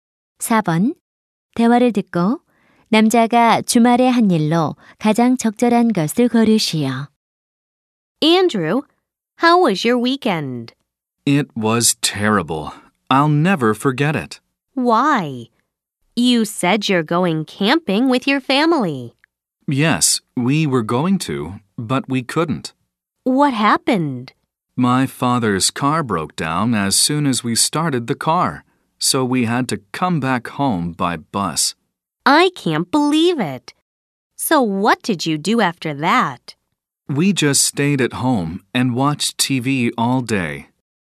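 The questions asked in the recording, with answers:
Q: 대화를 듣고 남자가 주말에 한 일로 가장 적절한 것을 고르시오.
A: 하루 종일 집에서 TV 시청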